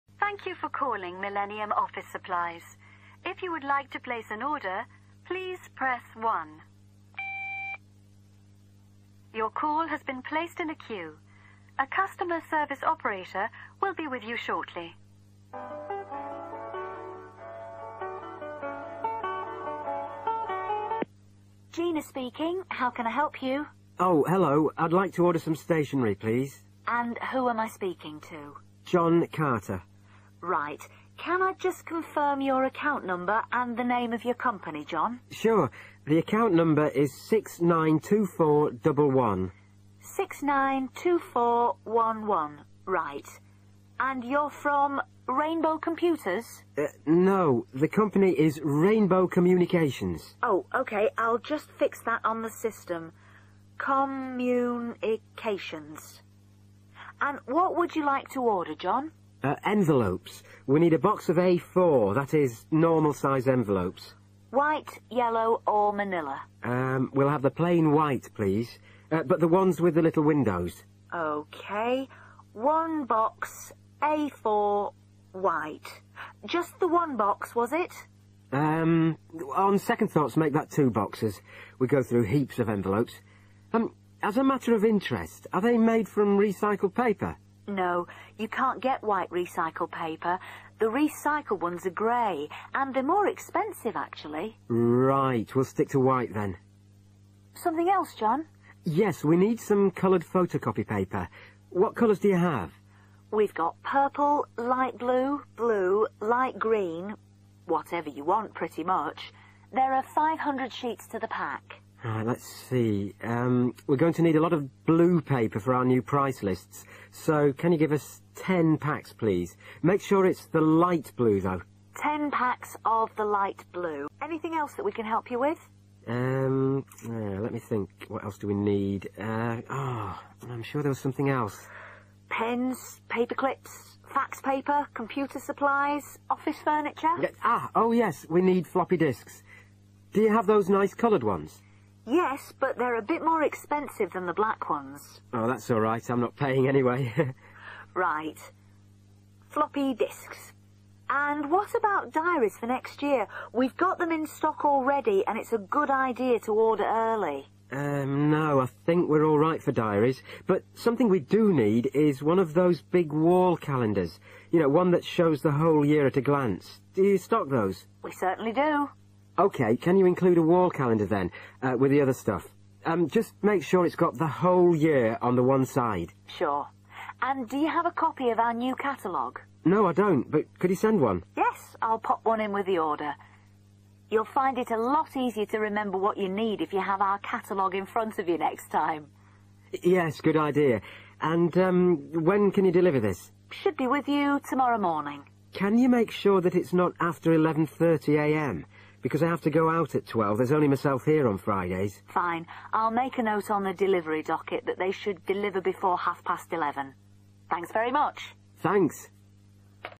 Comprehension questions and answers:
Complete the form below. Write NO MORE THAN THREE WORDS AND/OR A NUMBER for each answer.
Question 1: ACCOUNT NUMBER 1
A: 692411

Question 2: COMPANY NAME 2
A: Rainbow Communications

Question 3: Colour 3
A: white

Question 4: Quantity 4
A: two/2 boxes

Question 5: Colour 5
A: light blue

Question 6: Quantity 6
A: 10 packs/10 packets

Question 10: Special instructions: Deliver goods 10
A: before 11.30/not after 11.30/by 11.30

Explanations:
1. Từ cần điền là số Trong transcript có đọc số: 6 – 9 – 2 – 4 – double 1, "double 1" nghĩa là 11 (hai số 1 liền nhau) ⇒ Đáp án: 692411
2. Từ cần điền là tên riêng công ty Người phụ nữ hỏi ban đầu Cô ấy đoán: "Rainbow Computers?" Đây là một thông tin sai hoặc chỉ để kiểm tra. Người đàn ông đính chính Ông trả lời: "No. The company is Rainbow Communications." Đây là đáp án đúng: "Rainbow Communications". Người phụ nữ xác nhận lại Cô ấy nói: "OK, I'll just fix that ... communications." ⇒ Đáp án: Rainbow Communications
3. Từ cần điền là màu sắc Câu hỏi từ nhân viên bán hàng Đưa ra lựa chọn màu sắc: White, Yellow, Vanilla. Đây là tín hiệu cho ô "Colour" trên form. Khách hàng lựa chọn Người đàn ông trả lời: "plain white please – but the ones with the little windows." Nghĩa là: màu white, loại phong bì có cửa sổ nhỏ (little windows). Người phụ nữ xác nhận lại Cô ấy nhắc lại: "A4 – white." Điều này khẳng định màu sắc chính xác để điền là white. ⇒ Đáp án: white
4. Từ cần điền là số lượng Thông tin ban đầu Người phụ nữ xác nhận: "just the one box, was it?" Tức là ban đầu đơn hàng = 1 hộp. Khách hàng thay đổi quyết định Ông nói: "on second thoughts make that two boxes." Đây là cụm báo hiệu đổi ý trong tiếng Anh: on second thoughts = "nghĩ lại thì...". Số lượng cuối cùng Vì ông đổi từ 1 hộp → 2 hộp, nên đáp án chính xác là two boxes / 2 boxes. ⇒ Đáp án: 2 boxes
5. Từ cần điền là màu sắc Thông tin ban đầu Nhân viên đưa ra nhiều màu: purple, light blue, blue, light green. Đây là bước gợi ý cho khách chọn màu. Khách hàng chọn Ban đầu ông ấy chỉ nói: "a lot of blue paper". Nhưng sau đó ông ấy chỉnh lại: "Make sure it's the light blue though." Xác nhận Nhân viên nhắc lại: "Ten packs of the light blue." ⇒ Đáp án: light blue
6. Từ cần điền là số lượng Thông tin phụ dễ gây nhiễu Nhân viên nhắc: "There are 500 sheets to the pack." Đây chỉ là mô tả mỗi pack có bao nhiêu tờ, không phải số lượng cần đặt. Khách hàng đặt hàng Ông nói rõ: "can you give us ten packs, please". Đây mới là số lượng yêu cầu. Xác nhận lại Nhân viên nhấn mạnh: "Ten packs of the light blue." Đây là thông tin cuối cùng để điền. ⇒ Đáp án: 10 packs
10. Khách hàng yêu cầu Ông nói: "not after 11.30am" → tức là hàng phải được giao trước 11:30. Nhân viên xác nhận Bà nhắc lại: "deliver before half past eleven" → cùng nghĩa với "before 11.30". ⇒ Đáp án: before 11.30 (hoặc: not after 11.30 / by 11.30)

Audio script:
If you would like to place an order, please press one. Your call has been placed in a queue. A customer service operator will be with you shortly.
Woman: Gina speaking. How can I help you?
Man: Oh, hello – I'd like to order some stationery, please.
Woman: And who am I speaking to?
Man: John Carter.
Woman: Right – can I just confirm your account number and the name of your company, John?
Woman: Six nine two four one one. Right, and you're from 'Rainbow Computers?'
Man: No. The company is Rainbow Communications
Woman: Oh, OK, I'll just fix that on the system ... communications. And what would you like to order, John?
Man: Envelopes. We need a box of A4 – that is, normal size envelopes
Woman: White, yellow or vanilla?
Man: We'll have the plain white please – but the ones with the little windows
Woman: OK ... One box – A4 – white – just the one box, was it?
Man: Urn, on second thoughts make that two boxes. We go through heaps of envelopes. As a matter of interest. Are they made from recycled paper?
Woman: No. You can't get white recycled paper. The recycled ones are grey and they're more expensive actually.
Man: Right – we'll stick to white then.
Woman: Something else, John?
Man: Yes, we need some coloured photocopy paper. What colours do you have?
Woman: We've got purple, light blue, blue, light green – whatever you want, pretty much. There are 500 sheets to the pack.
Man: Let's see ... we're going to need a lot of blue paper for our new price lists so can you give us ten packs, please. Make sure it's the light blue though ...
Woman: Ten packs of the light blue. Anything else that we can help you with?
Man: Let me think ... What else do we need? I'm sure there was something else.
Woman: Pens, paper clips, fax paper, computer supplies, office furniture?
Man: Oh, yes! We need floppy disks – do you have those nice coloured ones?
Woman: Yes, but they're a bit more expensive than the black ones.
Man: That's alright. I'm not paying, anyway!
Woman: Right. Floppy disks. And what about diaries for next year? We've got them in stock already and it's a good idea to order early.
Man: No – I think we're alright for diaries but something we do need is one of those big wall calendars – you know, one that shows the whole year at a glance. Do you stock those?
Woman: We certainly do.
Man: OK – can you include a wall calendar then, with the other stuff. Just make sure it's got the whole year on the one side.
Woman: Sure – and do you have a copy of our new catalogue?
Man: No, I don't, but could you send one.
Woman: Yes! I'll pop one in with the order. You'll find it a lot easier to remember what you need if you have our catalogue in front of you next time.
Man: Yes, good idea. And when can you deliver this?
Woman: Should be with you tomorrow morning.
Man: Can you make sure that it's not after 11.30am because I have to go out at 12 there's only myself here on Fridays.
Woman: Fine – I'll make a note on the delivery docket that they should deliver before half past eleven. Thanks very much.